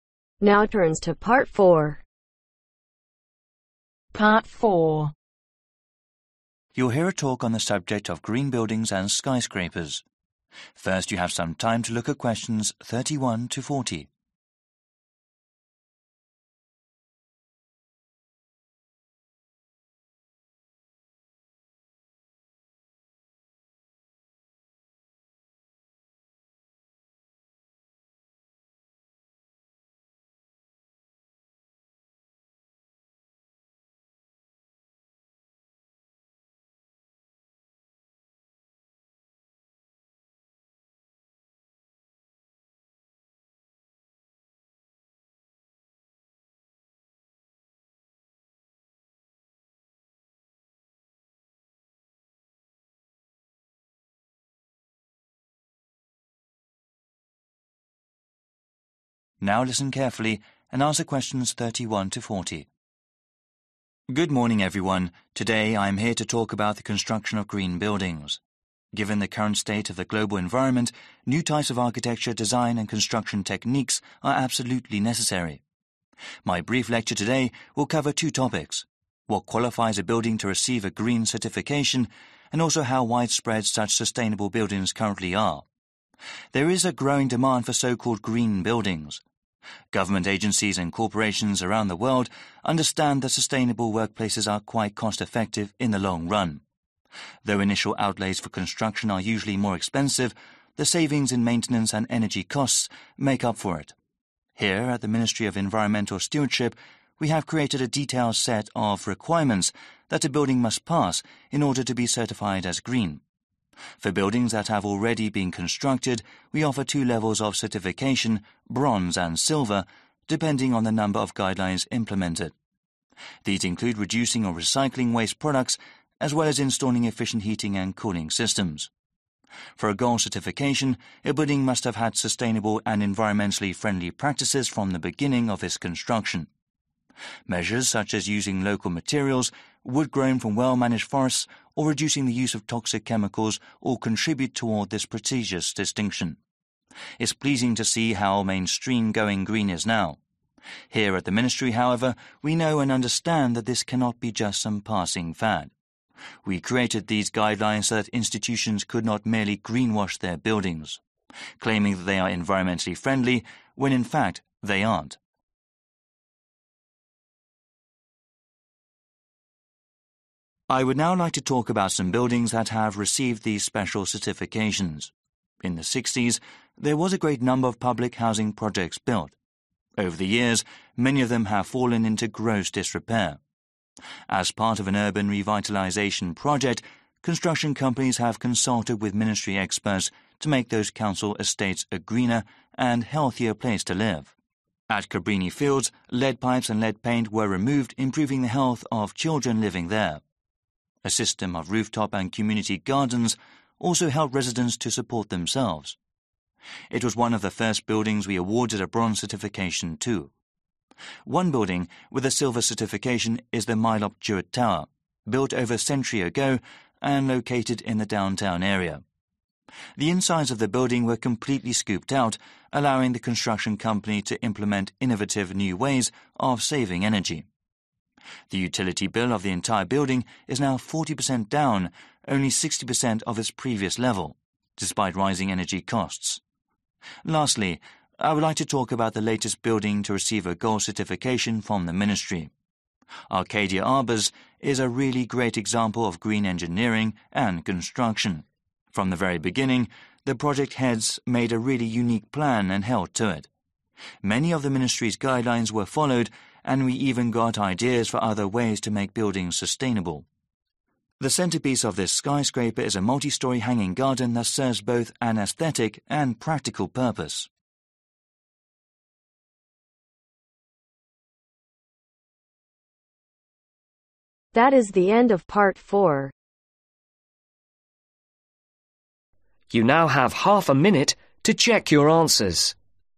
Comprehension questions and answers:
Complete the notes below. Write NO MORE THAN TWO WORDS OR A NUMBER for each answer.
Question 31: How (31)............ such environment friendly buildings currently are demand is growing for such buildings because:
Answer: Widespread

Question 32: Governments and corporations understand green buildings are saving money in the (32)............ because of savings in maintenance and (33)............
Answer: Long run

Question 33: Governments and corporations understand green buildings are saving money in the (32)............ because of savings in maintenance and (33)............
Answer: Energy costs

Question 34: Certification for buildings that already exit is offered in two levels: (34)............ and (35)............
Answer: Bronze/silver

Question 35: Certification for buildings that already exit is offered in two levels: (34)............ and (35)............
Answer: Silver/bronze

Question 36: Special gold certification requires approved construction techniques from the (36)............ of the building's construction.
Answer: Beginning

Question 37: Lead pipes and lead (37)............ removed.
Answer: Paint

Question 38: A system of rooftop and community (38)............ help residents support themselves.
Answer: Gardens

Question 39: After extensive renovations, the building pays just (39)............ percent of its old maintenance and energy costs.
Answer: Sixty/60

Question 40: People in charge made a really (40)............ and stuck to it.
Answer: Unique plan